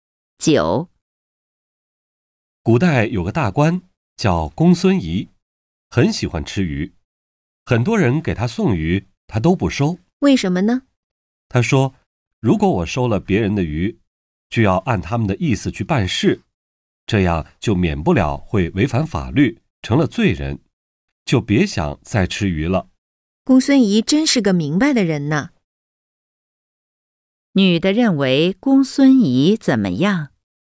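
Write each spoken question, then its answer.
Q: 女的认为公孙仪怎么样?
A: 是个明白的人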